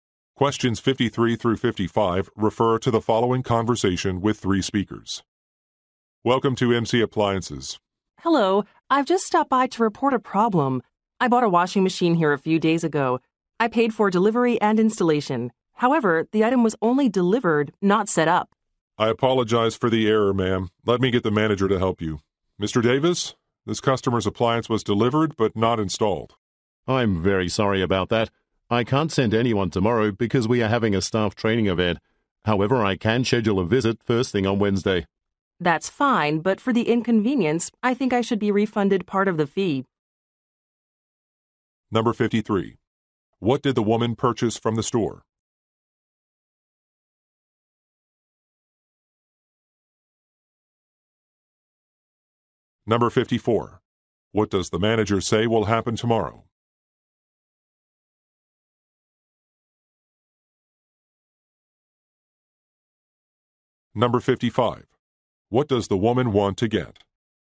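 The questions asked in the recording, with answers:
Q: What did the woman purchase from the store?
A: A washing machine

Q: What does the manager say will happen tomorrow?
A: A staff training event

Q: What does the woman want to get?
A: A partial refund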